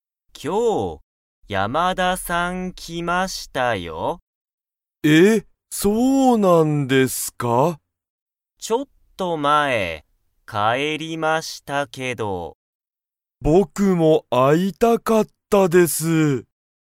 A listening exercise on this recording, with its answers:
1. 山田(やまだ)さんは、____帰(かえ)った。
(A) 田中(たなか)さんと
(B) ちょっと前まえに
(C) 今(いま)から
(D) 佐藤(さとうさんと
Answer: (B) ちょっと前まえに

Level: Level 1

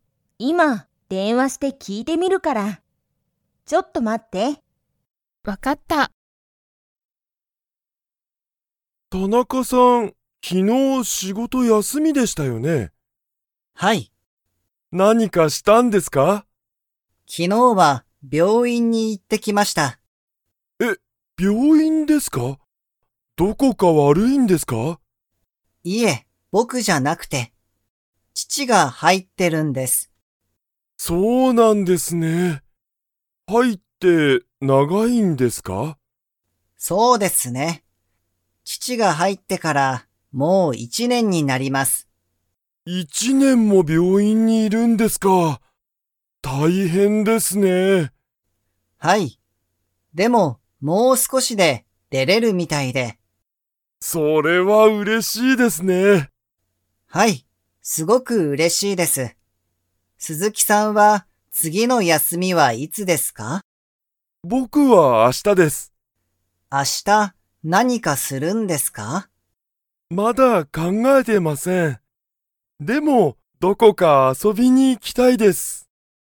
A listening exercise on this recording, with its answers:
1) 田中(たなか)さんは、どこか悪(わる)いですか?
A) はい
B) いいえ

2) 田中(たなか)さんの父(ちち)は、____に入(はい)ってから一年(いちねん)だ。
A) カラオケ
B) 病院(びょういん)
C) 仕事(しごと)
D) 休(やす)み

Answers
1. B) いいえ
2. B) 病院(びょういん)

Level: Level 2

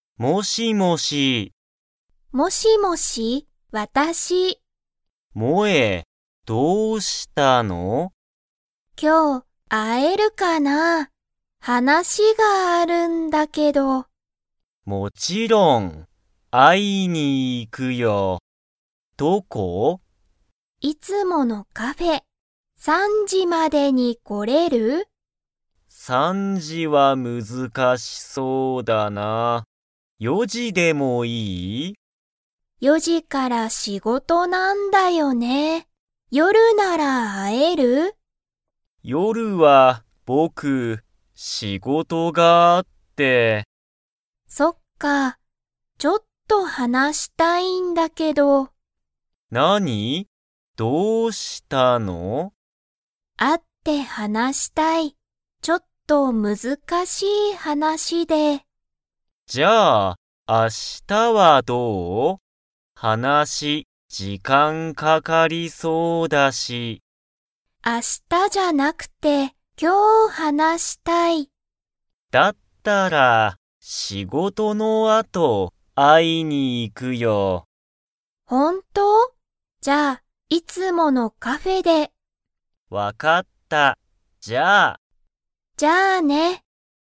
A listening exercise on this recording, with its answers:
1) ケンとモエは、今日(きょう)4(よ)時(じ)に会(あ)いますか?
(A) はい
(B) いいえ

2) モエは、会(あ)って____。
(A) 話(はな)したい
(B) 遊あそびたい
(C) 食(た)べたい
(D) 仕事(しごと)したい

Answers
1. (B) いいえ
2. (A) 話(はな)したい

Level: Level 2

